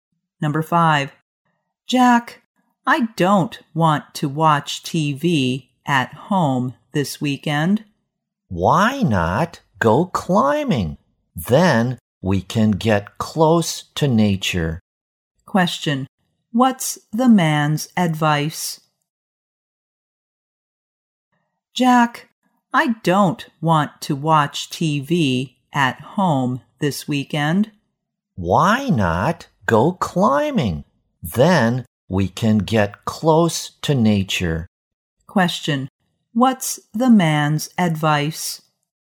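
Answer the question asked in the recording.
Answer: To go climbing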